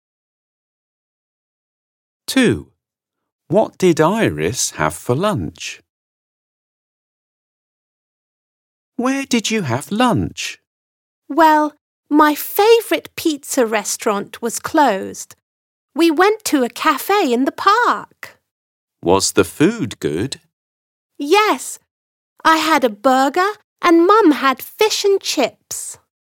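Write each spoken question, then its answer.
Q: What did Iris have for lunch?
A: a burger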